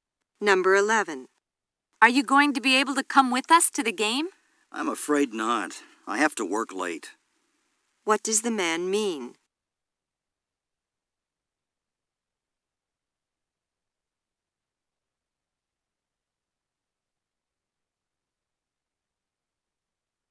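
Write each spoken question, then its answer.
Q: What does the man mean?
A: He can't go to the game because he has to work late.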